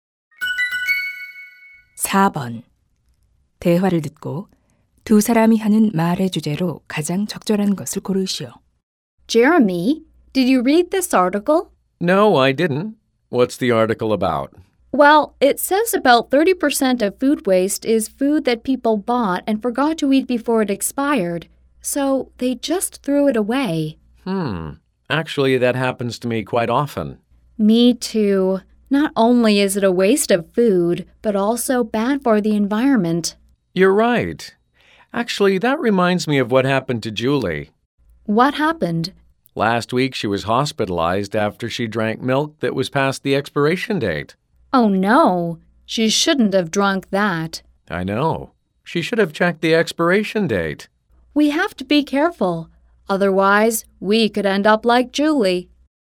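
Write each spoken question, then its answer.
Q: 대화를 듣고 두 사람이 하는 말의 주제로 가장 적절한 것을 고르시오.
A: 음식의 유통기한을 확인하는 것의 중요성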